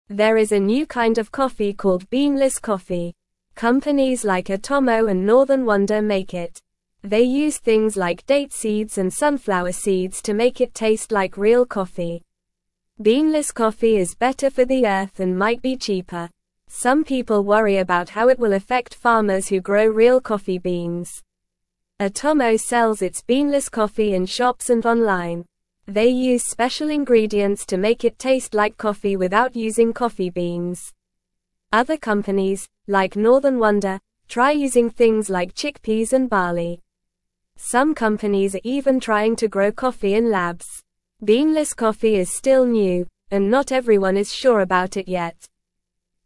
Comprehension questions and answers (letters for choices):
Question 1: They use things like date (1)______ and (2)______ seeds to make it taste like real coffee.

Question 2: (3)______ coffee is better for the Earth and might be cheaper.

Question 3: Some people worry about how it will affect farmers who grow real coffee (4)______.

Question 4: They use special ingredients to make it taste like coffee without (5)______ coffee beans.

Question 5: Other (6)______, like Northern Wonder, try using things like chickpeas and (7)______.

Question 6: Other (6)______, like Northern Wonder, try using things like chickpeas and (7)______.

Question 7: Some companies are even trying to grow coffee in (8)______.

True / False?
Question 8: Some people are excited about how beanless coffee will benefit farmers who grow real coffee beans.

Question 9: Beanless coffee might be better for the Earth.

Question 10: They use things like apple seeds and sesame seeds to make beanless coffee taste like real coffee.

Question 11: Atomo uses special ingredients to make their beanless coffee taste like coffee without using coffee beans.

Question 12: Atomo sells their beanless coffee only in shops and not online.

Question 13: Beanless coffee is a new type of coffee.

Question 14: Some companies are trying to grow tea in labs to make beanless coffee.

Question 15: Companies like Atomo and Northern Wonder make beanless coffee.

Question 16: What is the new kind of coffee called?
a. Tea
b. Orange juice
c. Beanless coffee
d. Lemonade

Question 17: What do companies like Atomo and Northern Wonder use to make beanless coffee taste like real coffee?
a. Apples and bananas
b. Carrots and broccoli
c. Date seeds and sunflower seeds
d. Potatoes and tomatoes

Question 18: Where can you buy Atomo's beanless coffee?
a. In the park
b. At the beach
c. In a library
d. In shops and online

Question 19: What are some ingredients used by companies to make beanless coffee taste like real coffee?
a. Chocolate and candy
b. Chickpeas and barley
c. Pizza and burgers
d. Ice cream and cake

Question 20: Why are some people worried about beanless coffee?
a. How it will affect farmers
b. How it will affect the weather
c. How it will affect animals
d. How it will affect the ocean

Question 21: What are some companies trying to do with coffee in labs?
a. Grow it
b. Eat it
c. Dance with it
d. Sing to it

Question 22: Is everyone sure about beanless coffee yet?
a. Yes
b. Maybe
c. Sometimes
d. No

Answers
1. sunflower
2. Beanless
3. beans
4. using
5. companies
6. barley
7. labs
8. False
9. True
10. False
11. True
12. False
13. True
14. False
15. True
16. c
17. c
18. d
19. b
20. a
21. a
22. d

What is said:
There is a new kind of coffee called beanless coffee. Companies like Atomo and Northern Wonder make it. They use things like date seeds and sunflower seeds to make it taste like real coffee. Beanless coffee is better for the Earth and might be cheaper. Some people worry about how it will affect farmers who grow real coffee beans.
Atomo sells its beanless coffee in shops and online. They use special ingredients to make it taste like coffee without using coffee beans. Other companies, like Northern Wonder, try using things like chickpeas and barley. Some companies are even trying to grow coffee in labs. Beanless coffee is still new, and not everyone is sure about it yet.

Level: Level 1